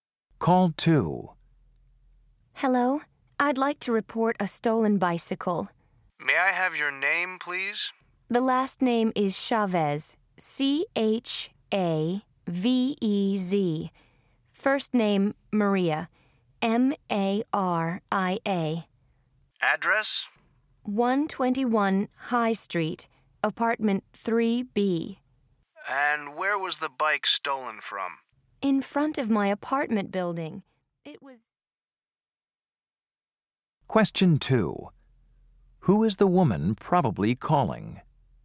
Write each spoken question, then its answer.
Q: Who is the woman probably calling?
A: Police Department. Officer Wyman speaking.